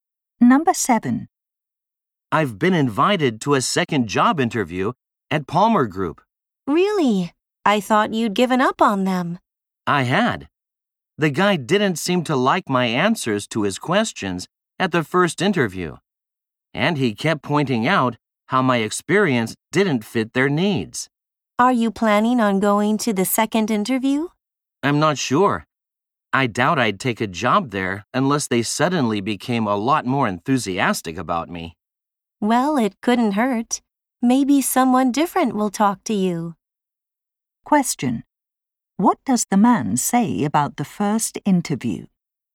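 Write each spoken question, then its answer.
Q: What does the man say about the first interview?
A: The interviewer didn't seem impressed with him.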